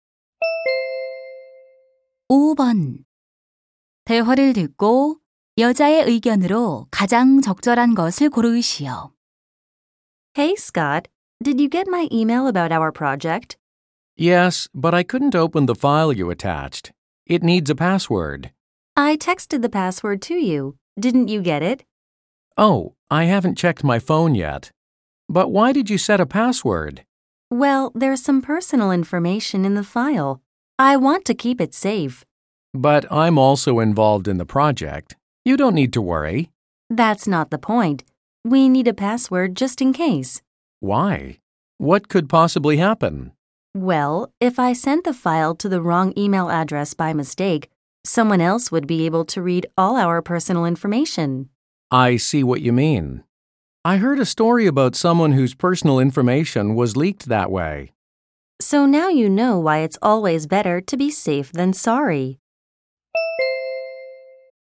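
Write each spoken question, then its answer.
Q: 대화를 듣고 여자의 의견으로 가장 적절한 것을 고르시오.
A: 개인 정보가 담긴 파일에는 만일을 대비해 비밀번호를 설정해야 한다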